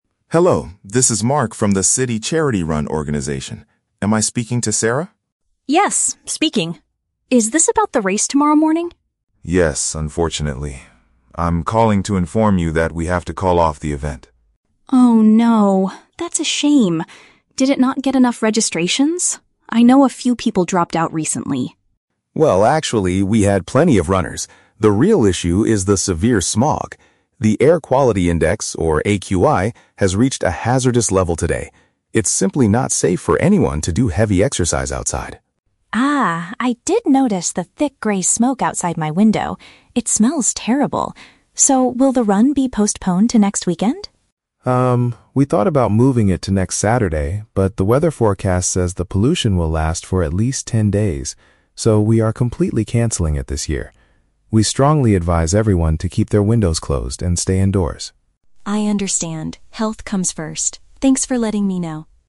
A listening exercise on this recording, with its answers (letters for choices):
Listen to a phone call between an event organizer and a participant. Choose the correct answer (A, B, or C) for each question.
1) Why is Mark calling Sarah?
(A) To inform her that an outdoor activity is cancelled.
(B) To tell her that the race needs more registrations.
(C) To invite her to a new charity event next weekend.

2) What is the main reason for the organizer's decision?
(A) A severe rainstorm is predicted for tomorrow morning.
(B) Many people dropped out of the race at the last minute.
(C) The level of air pollution is dangerously high.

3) What will happen to the charity run?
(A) It will be delayed until the following Saturday.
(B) It will not happen at all this year.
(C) It will take place inside a sports center instead.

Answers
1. A
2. C
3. B

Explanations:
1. Mark says, "I'm calling to inform you that we have to call off the event." (Paraphrasing: call off = cancel; event / race = outdoor activity).
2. Mark explains that the issue is the "severe smog" and the AQI has reached a "hazardous level." (Paraphrasing: severe smog / AQI = air pollution; hazardous = dangerously high).
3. Because the pollution will last a long time, Mark says, "we are completely canceling it this year." (Paraphrasing: completely canceling it = will not happen at all).

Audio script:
Mark: Hello, this is Mark from the City Charity Run organization. Am I speaking to Sarah?
Sarah: Yes, speaking. Is this about the race tomorrow morning?
Mark: Yes, unfortunately. I'm calling to inform you that we have to call off the event.
Sarah: Oh, no. That's a shame. Did it not get enough registrations? I know a few people dropped out recently.
Mark: Well, actually, we had plenty of runners. The real issue is the severe smog. The Air Quality Index, or AQI, has reached a hazardous level today. It's simply not safe for anyone to do heavy exercise outside.
Sarah: Ah, I did notice the thick gray smoke outside my window. It smells terrible. So, will the run be postponed to next weekend?
Mark: Um, we thought about moving it to next Saturday, but the weather forecast says the pollution will last for at least ten days. So, we are completely canceling it this year. We strongly advise everyone to keep their windows closed and stay indoors.
Sarah: I understand. Health comes first. Thanks for letting me know.